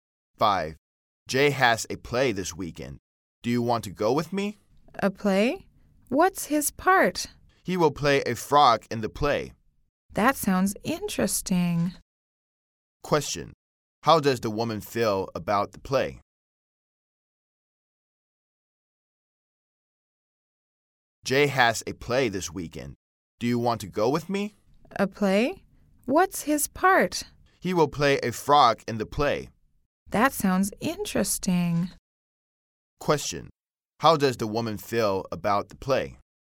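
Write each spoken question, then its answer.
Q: How does the woman feel about the play?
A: She thinks it sounds interesting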